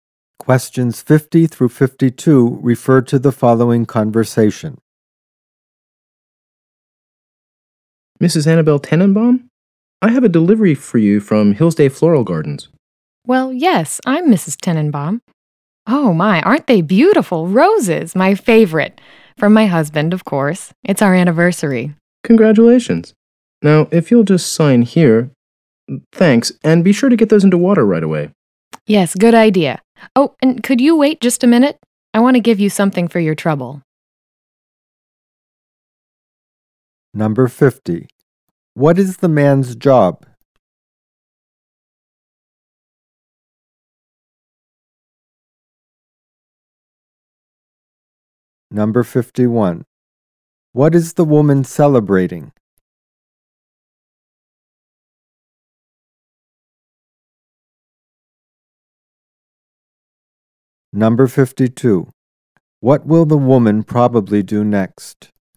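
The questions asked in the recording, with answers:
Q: What is the man's job?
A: Flower delivery person

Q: What is the woman celebrating?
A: Her wedding anniversary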